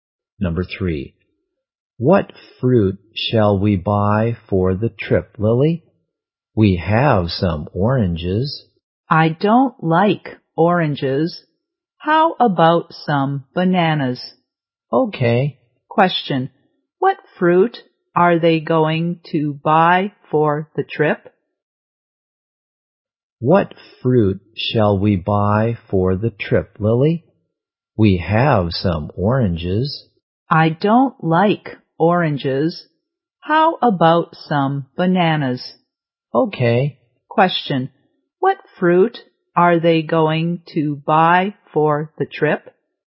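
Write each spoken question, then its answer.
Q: what fruit are they going to buy for the trip?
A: Bananas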